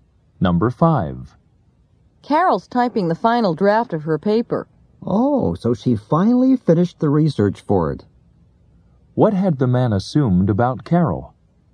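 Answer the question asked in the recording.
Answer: That she hadn't finished the research for her paper.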